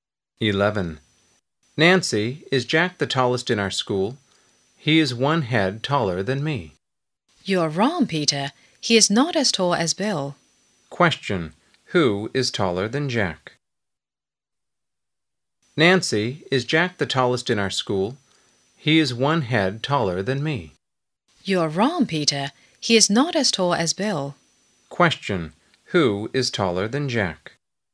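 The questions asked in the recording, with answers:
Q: Who is taller than Jack?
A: Bill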